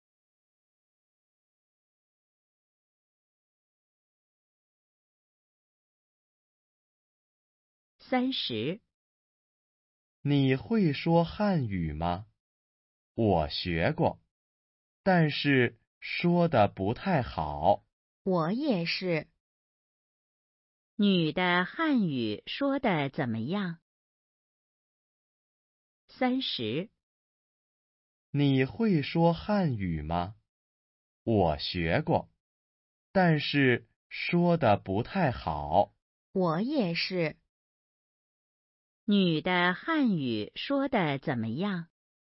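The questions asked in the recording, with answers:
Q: 女的汉语说得怎么样?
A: 不太好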